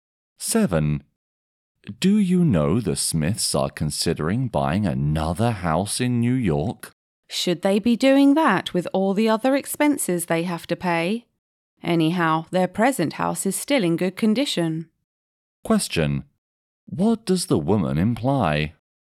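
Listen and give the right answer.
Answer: The Smiths shouldn't buy another house.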